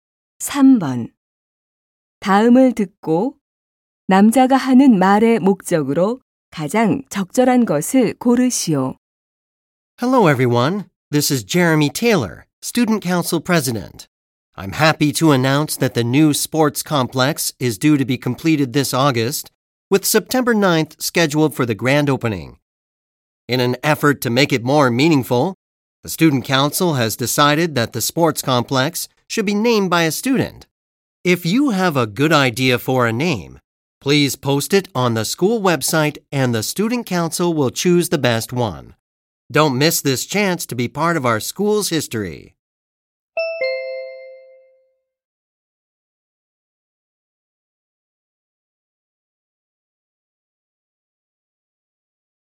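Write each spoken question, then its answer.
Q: 다음을 듣고 남자가 하는 말의 목적으로 가장 적절한 것을 고르시오.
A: 새 체육관 이름 공모를 알리려고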